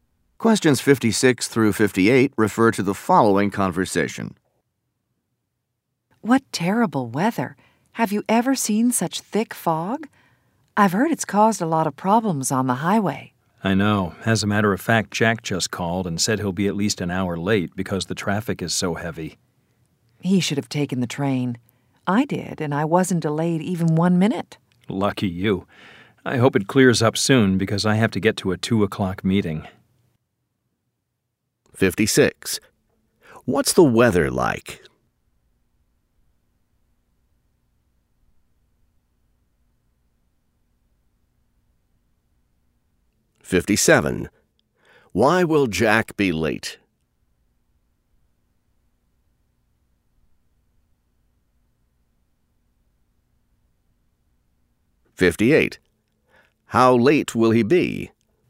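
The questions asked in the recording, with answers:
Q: What's the weather like?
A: Foggy

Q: Why will Jack be late?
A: Heavy traffic (because of the fog)

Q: How late will he be?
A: At least an hour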